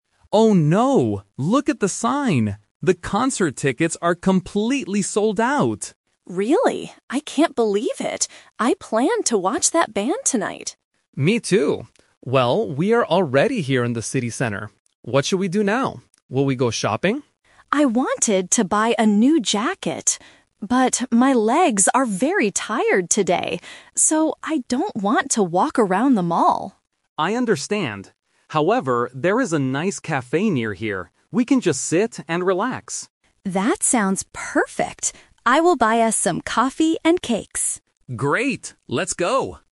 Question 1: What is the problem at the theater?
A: The tickets are sold out.

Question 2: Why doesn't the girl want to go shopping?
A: Her legs are very tired.

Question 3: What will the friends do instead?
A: Go to a cafe

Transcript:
Boy: Oh no, look at the sign! The concert tickets are completely sold out!
Girl: Really? I can't believe it. I planned to watch that band tonight.
Boy: Me too. Well, we are already here in the city center. What should we do now? Will we go shopping?
Girl: I wanted to buy a new jacket. But, my legs are very tired today. So, I don't want to walk around the mall.
Boy: I understand. However, there is a nice cafe near here. We can just sit and relax.
Girl: That sounds perfect. I will buy us some coffee and cakes.